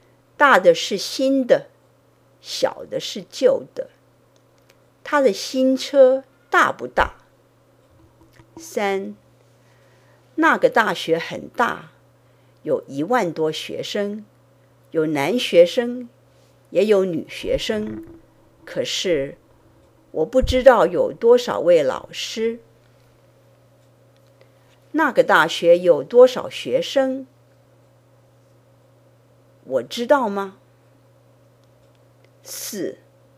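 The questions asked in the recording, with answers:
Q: 那个大学有多少学生?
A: 一万多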